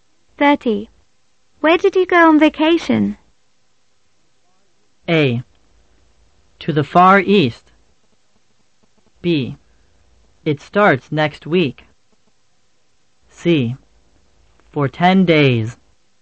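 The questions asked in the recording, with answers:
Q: Where did you go on vacation?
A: A: To the Far East.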